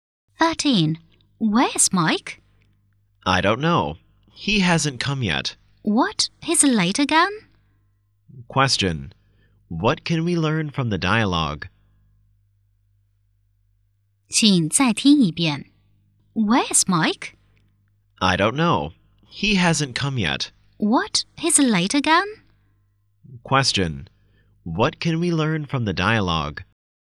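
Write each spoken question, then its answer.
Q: Question: What can we learn from the dialogue?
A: Mike is often late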